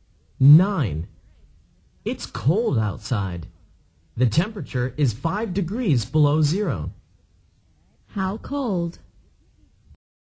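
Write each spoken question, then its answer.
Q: How cold?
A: 5 degrees below zero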